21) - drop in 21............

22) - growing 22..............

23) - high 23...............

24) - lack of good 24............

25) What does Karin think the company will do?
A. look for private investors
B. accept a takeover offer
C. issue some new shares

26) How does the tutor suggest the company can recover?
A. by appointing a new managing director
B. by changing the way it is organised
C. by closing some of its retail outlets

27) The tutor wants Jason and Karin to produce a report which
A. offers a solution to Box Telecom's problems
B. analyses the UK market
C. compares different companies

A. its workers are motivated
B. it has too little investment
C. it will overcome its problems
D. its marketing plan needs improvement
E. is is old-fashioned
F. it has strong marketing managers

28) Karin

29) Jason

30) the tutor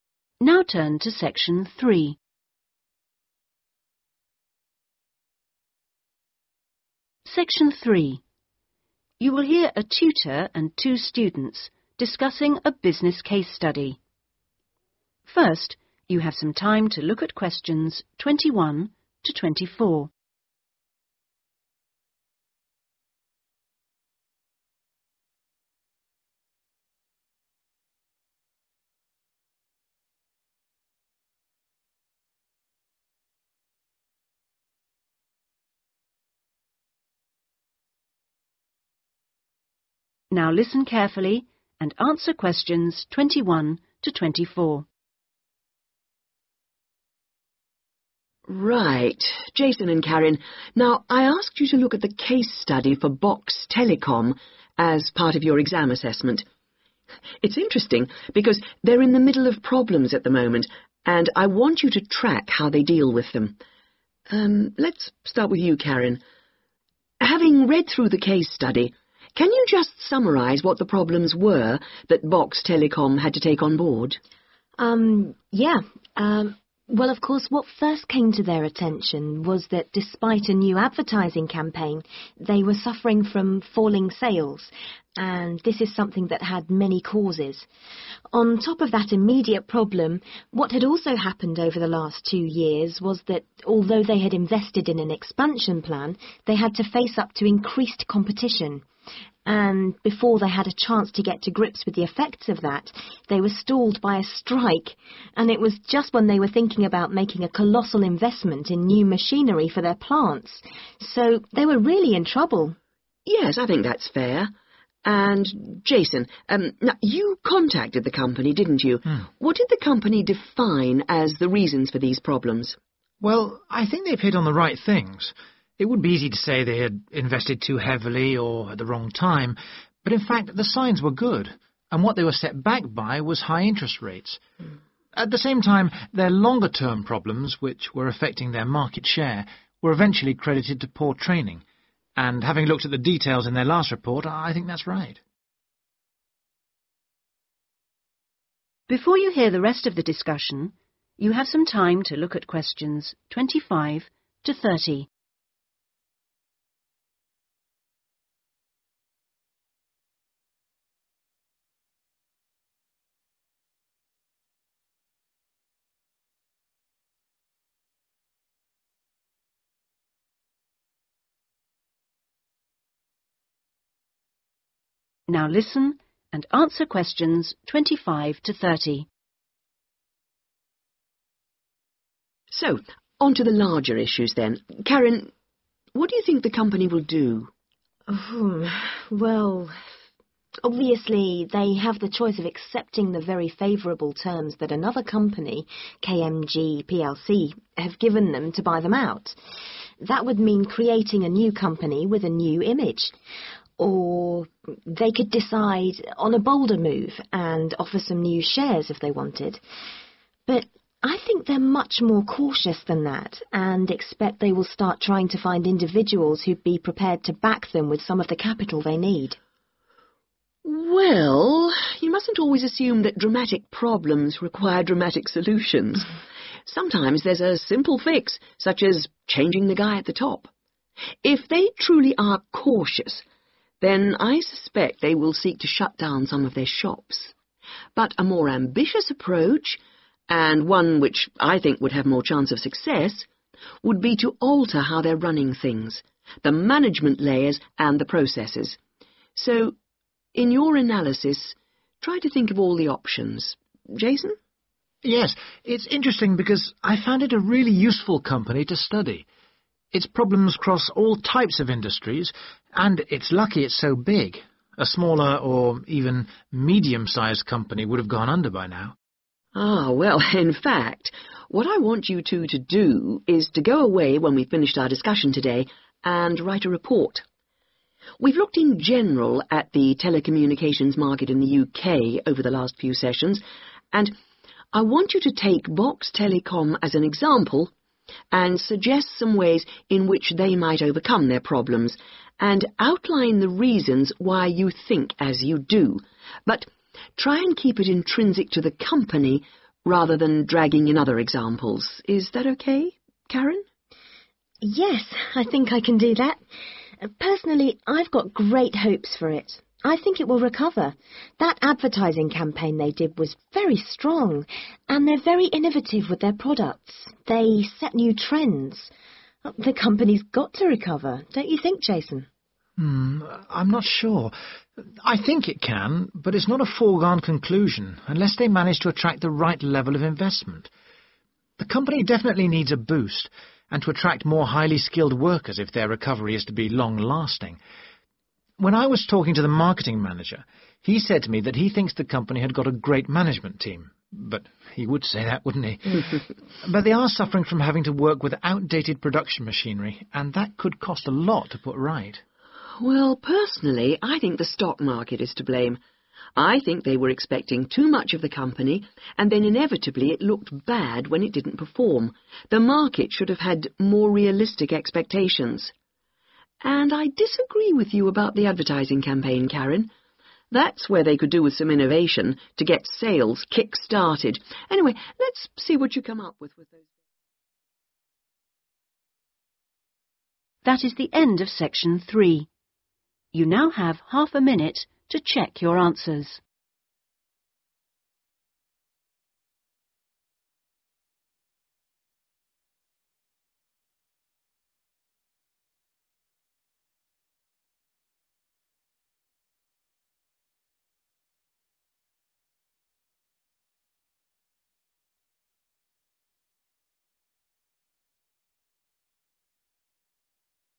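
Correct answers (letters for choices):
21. sales
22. competition
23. interest rates
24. training
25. A
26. B
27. A
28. C
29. B
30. D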